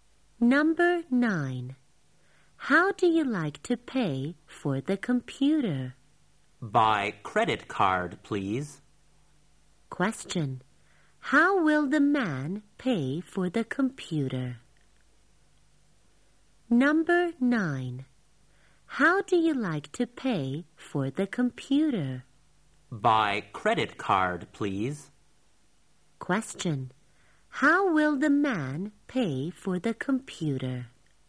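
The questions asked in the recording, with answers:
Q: How will the man pay for the computer?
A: By credit card.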